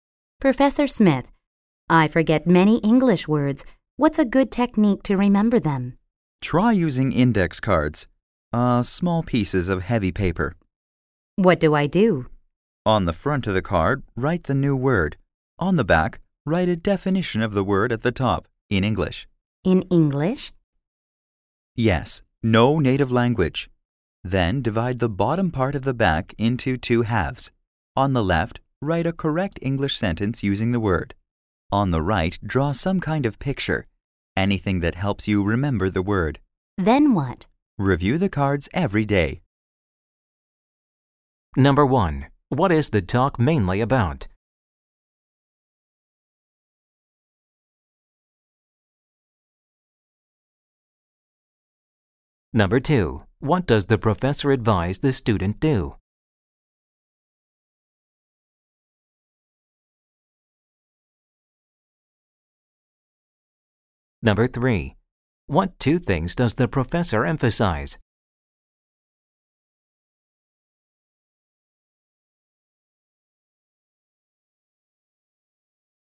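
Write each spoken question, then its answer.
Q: What is the talk mainly about?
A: A technique for remembering English words using index cards

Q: What does the professor advise the student do?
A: Use index cards and review them every day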